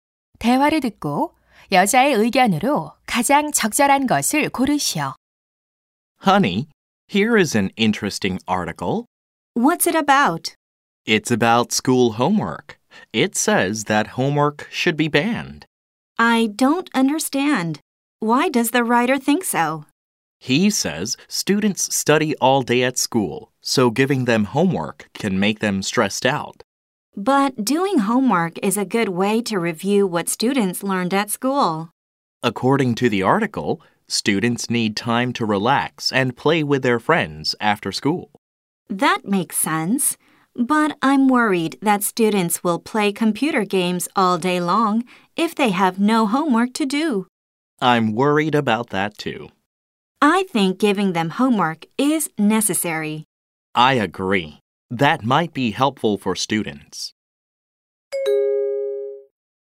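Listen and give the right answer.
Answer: 학생들에게 숙제를 내주는 것은 필요하다.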